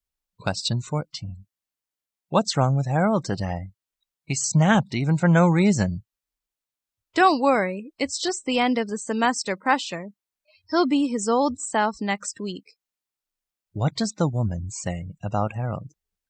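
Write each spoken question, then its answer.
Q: What does the woman say about Harold?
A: He's under end-of-semester pressure and will be back to normal soon.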